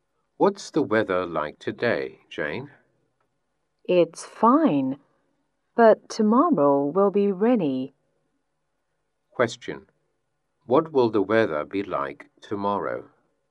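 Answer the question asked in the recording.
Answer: Rainy.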